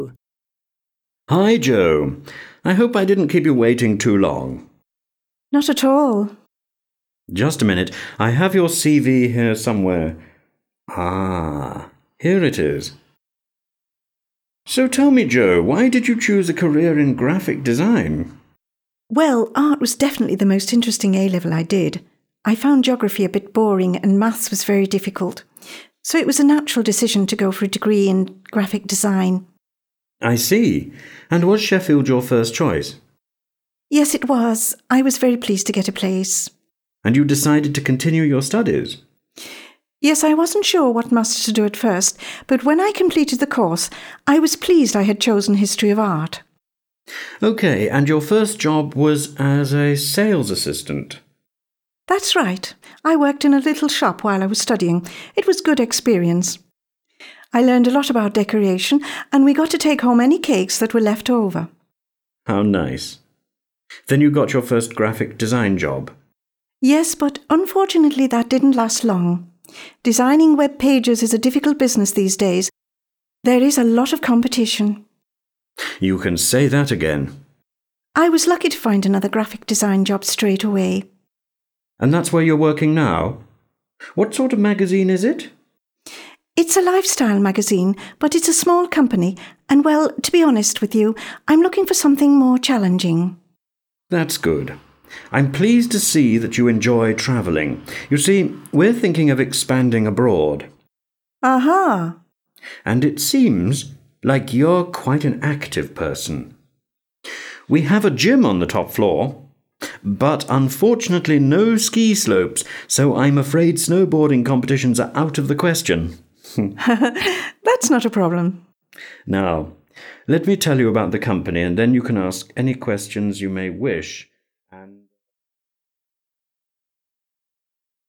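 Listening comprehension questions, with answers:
2. Listen to a woman who is being interviewed for a graphic design job and decide if the statements 1-5 are True or False. (Прослухайте інтерв'ю прийому на роботу та вирішіть, чи є подані нижче твердження правдивими – Т, або неправдивими – F та зробіть відповідну позначку )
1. Jo was late for the interview.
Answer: False

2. It was hard for Jo to solve math tasks in school.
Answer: True

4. Jo is working for a newspaper now.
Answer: False

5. The company is thinking of putting a gym on the top floor.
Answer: False

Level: 9-Б клас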